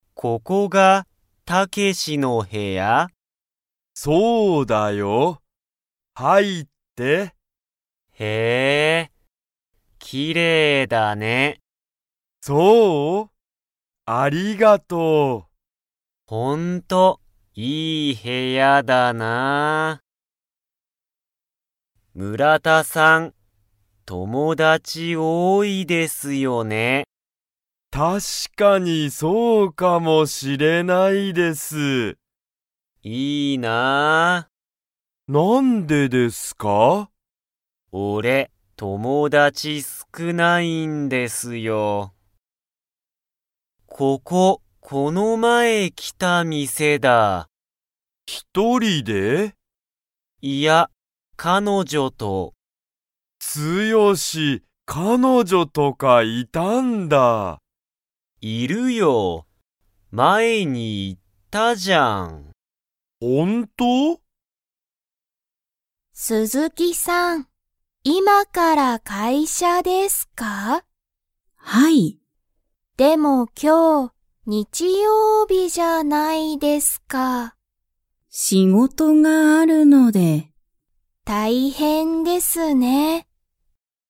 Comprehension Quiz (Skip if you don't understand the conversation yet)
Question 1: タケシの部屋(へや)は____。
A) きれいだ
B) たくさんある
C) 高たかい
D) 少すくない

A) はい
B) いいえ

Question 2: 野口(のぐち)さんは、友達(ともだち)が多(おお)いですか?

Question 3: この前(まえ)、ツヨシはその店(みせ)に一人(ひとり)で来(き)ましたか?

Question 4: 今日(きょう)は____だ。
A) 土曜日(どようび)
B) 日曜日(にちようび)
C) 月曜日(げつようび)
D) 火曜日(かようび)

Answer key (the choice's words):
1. きれいだ
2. いいえ
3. いいえ
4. 日曜日(にちようび)

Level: Level 1